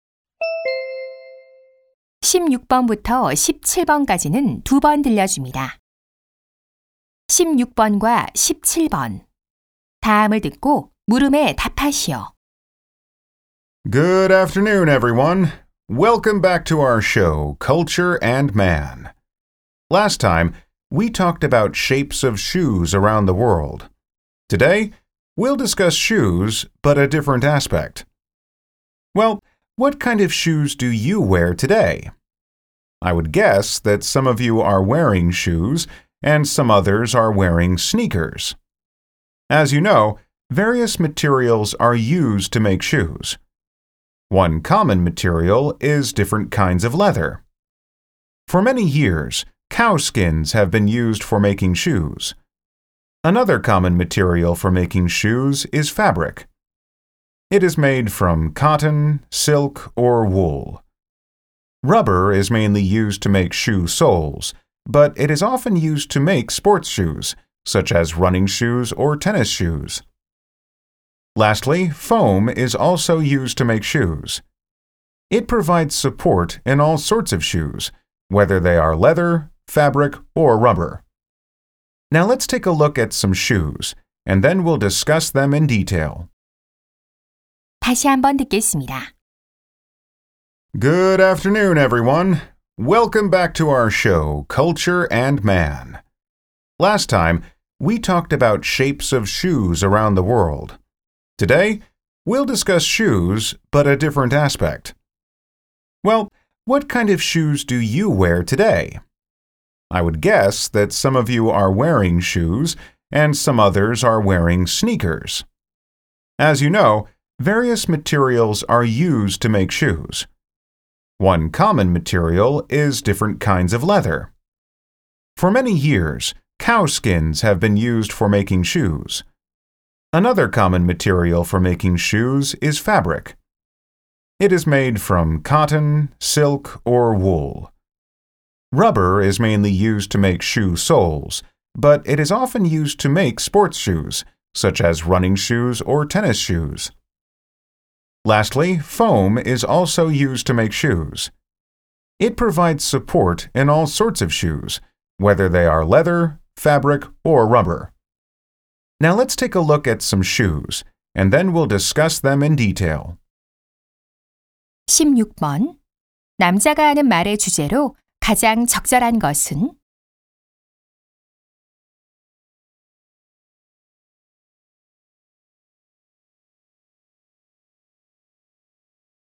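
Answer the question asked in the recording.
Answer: 신발을 만드는 데 사용되는 다양한 재료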